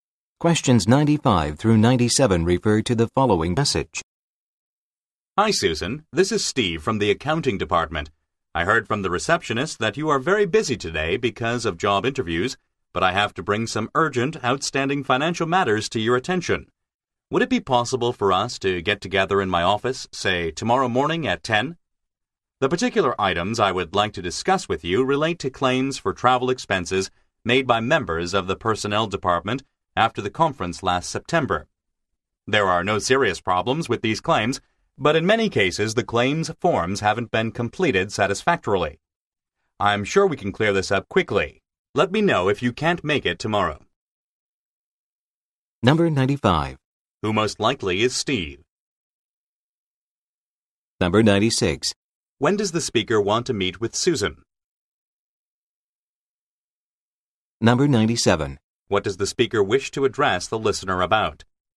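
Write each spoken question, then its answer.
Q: Who most likely is Steve?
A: An employee in the accounting department

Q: When does the speaker want to meet with Susan?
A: Tomorrow morning at 10

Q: What does the speaker wish to address the listener about?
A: Claims for travel expenses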